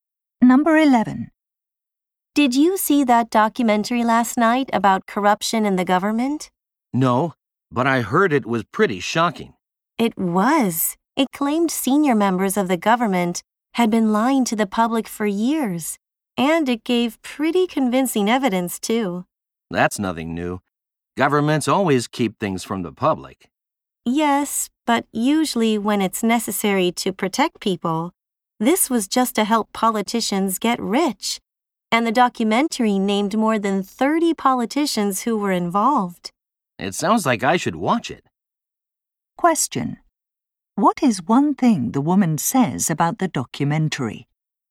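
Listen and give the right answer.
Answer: It named more than 30 politicians involved in corruption.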